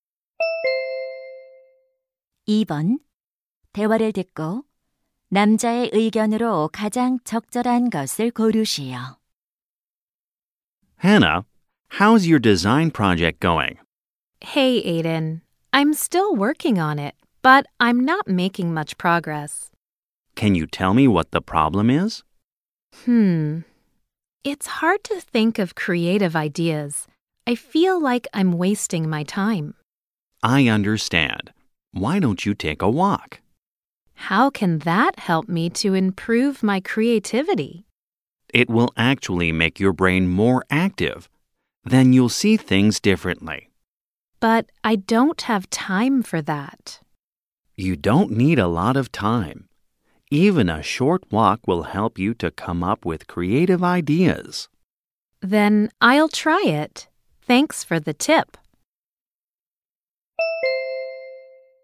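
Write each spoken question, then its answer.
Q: 대화를 듣고 남자의 의견으로 가장 적절한 것을 고르시오.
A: 짧은 산책이 창의적인 아이디어를 떠올리는 데 도움이 된다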